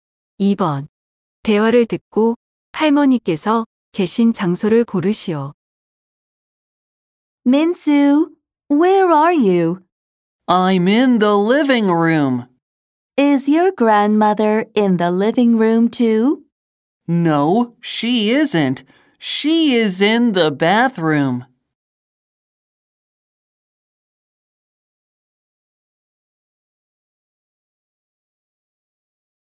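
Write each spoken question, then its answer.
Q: 대화를 듣고 할머니께서 계신 장소를 고르시오.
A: 욕실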